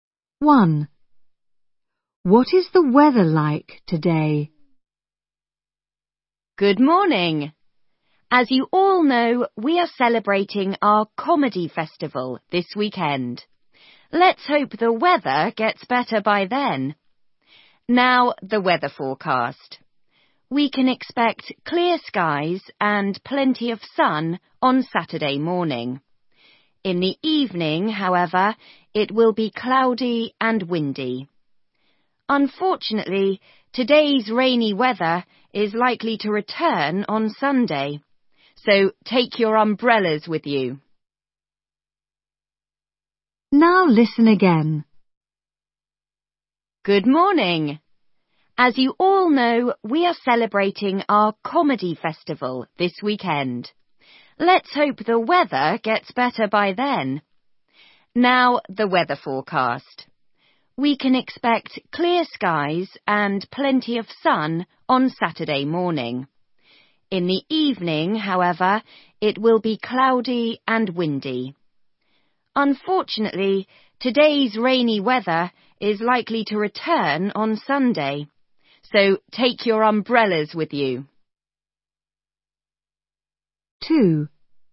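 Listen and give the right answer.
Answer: Rainy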